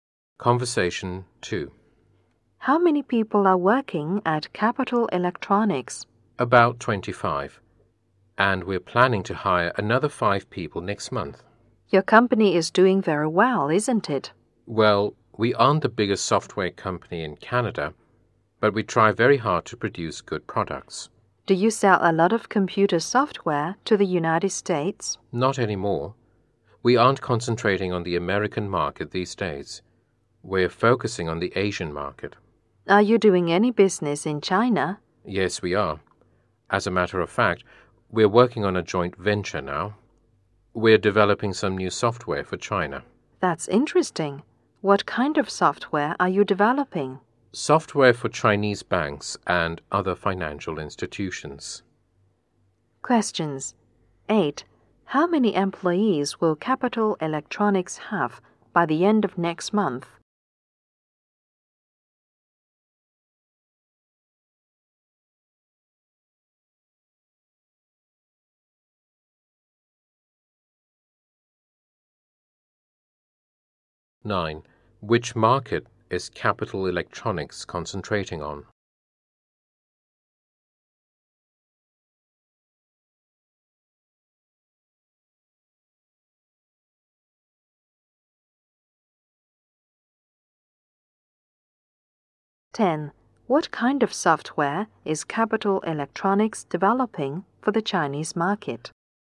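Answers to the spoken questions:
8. About 30
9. The Asian market
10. Software for Chinese banks and other financial institutions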